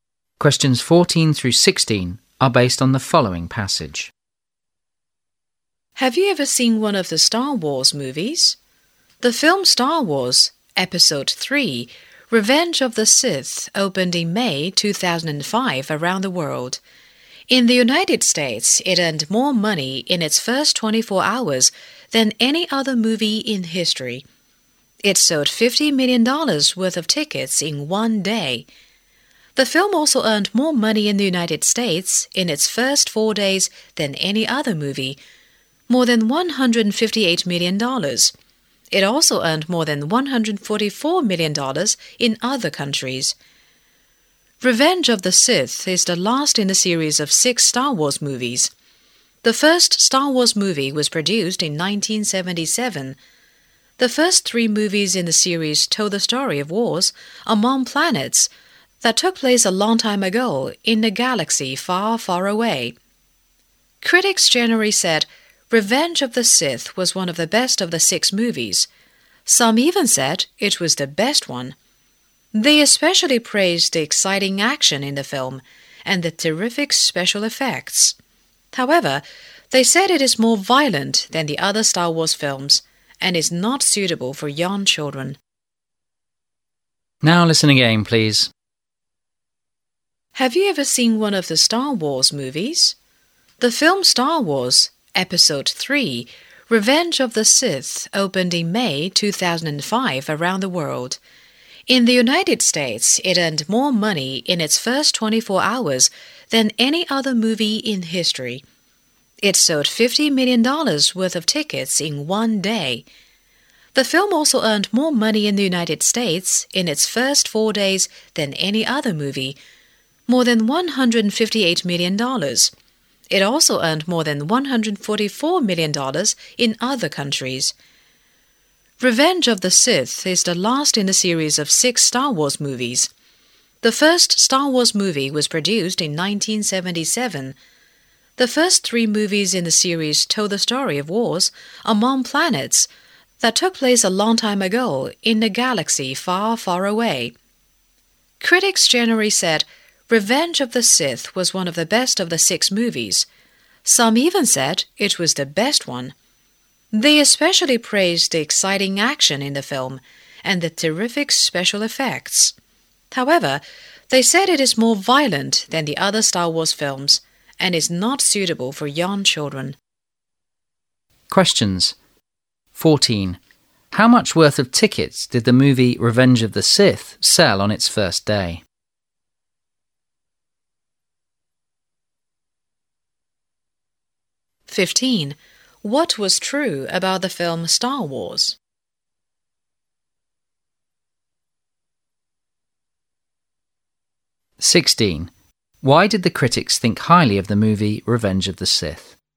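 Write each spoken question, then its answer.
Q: How much worth of tickets did the movie Revenge of the Sith sell on its first day?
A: $50 million

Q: Why did the critics think highly of the movie Revenge of the Sith?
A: Its exciting action and terrific special effects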